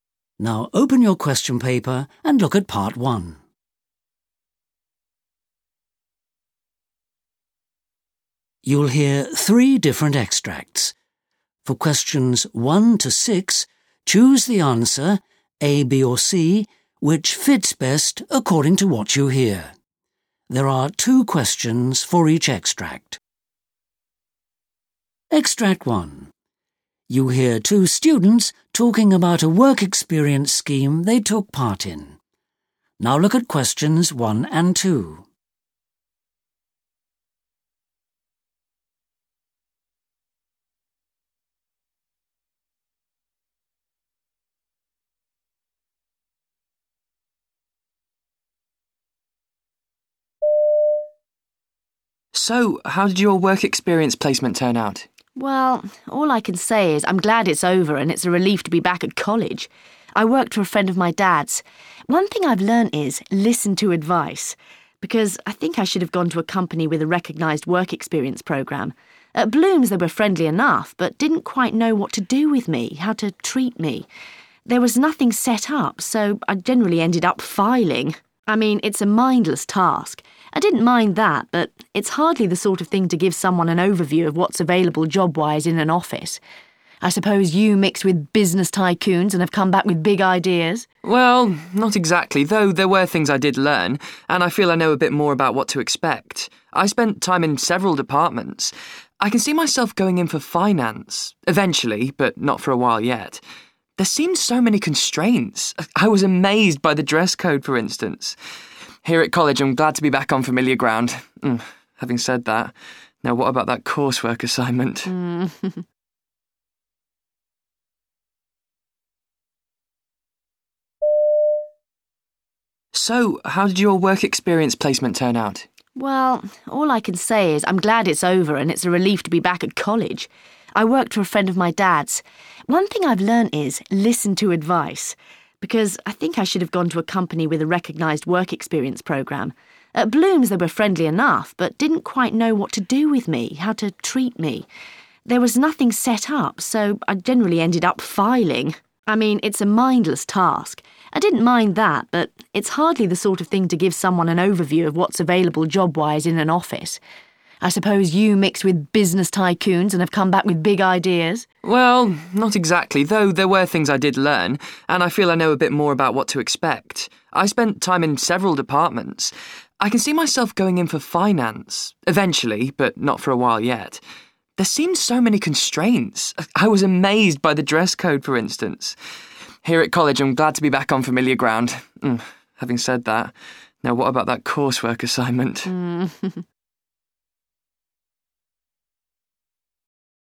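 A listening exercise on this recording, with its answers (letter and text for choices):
You hear two students talking about a work-experience scheme they took part in.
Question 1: Why does the girl regret her choice of company?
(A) The office was poorly equipped.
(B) The staff tended to ignore her.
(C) The work lacked variety.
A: (C) The work lacked variety.

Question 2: They both think that the work-experience scheme has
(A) been good preparation for a future job.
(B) made them appreciate student life more.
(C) taught them a lot about the business world.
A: (B) made them appreciate student life more.

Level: C1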